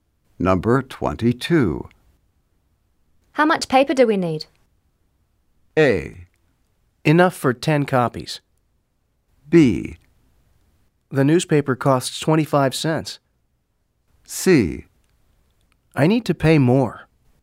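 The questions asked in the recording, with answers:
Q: How much paper do we need?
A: A: Enough for 10 copies.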